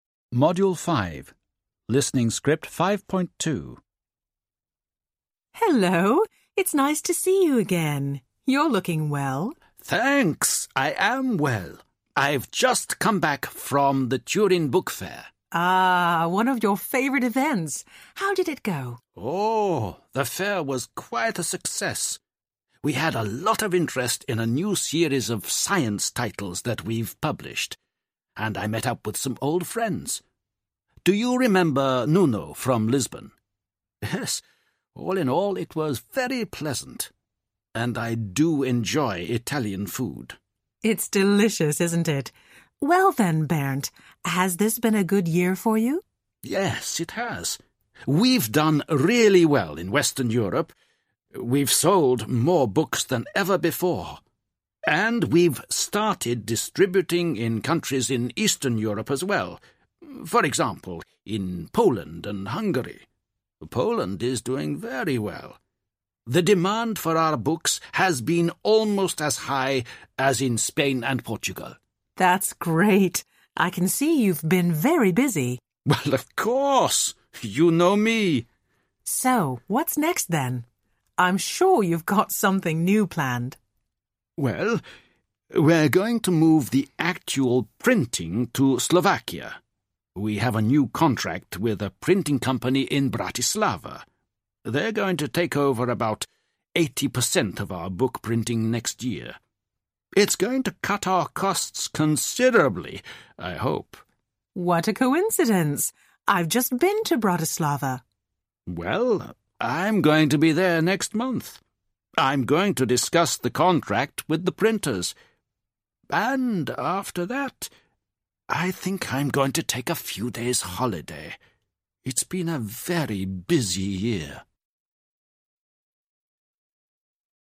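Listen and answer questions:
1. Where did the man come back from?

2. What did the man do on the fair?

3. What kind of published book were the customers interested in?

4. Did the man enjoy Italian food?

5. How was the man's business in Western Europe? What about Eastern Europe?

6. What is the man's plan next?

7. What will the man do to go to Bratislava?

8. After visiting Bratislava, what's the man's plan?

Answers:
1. The Turin Book Fair
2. He presented a new series of science titles and met up with old friends
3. A new series of science titles
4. Yes
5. Very good in Western Europe, selling more books than ever; they have started distributing in Eastern Europe, e.g. Poland and Hungary, and Poland is doing very well
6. To move the printing to a printing company in Bratislava, Slovakia
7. Discuss the contract with the printers
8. To take a few days' holiday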